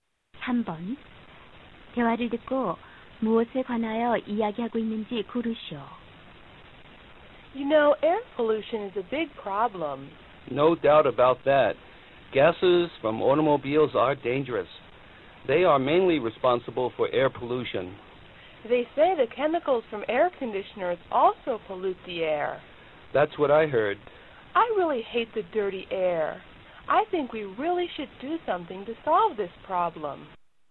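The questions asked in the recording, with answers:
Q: 대화를 듣고 무엇에 관하여 이야기하고 있는지 고르시오.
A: 대기 오염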